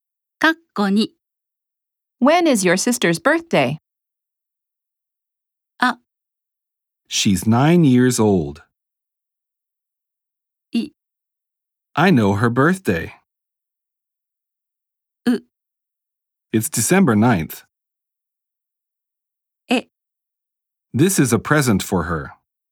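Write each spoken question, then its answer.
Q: When is your sister's birthday?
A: U: It's December 9th.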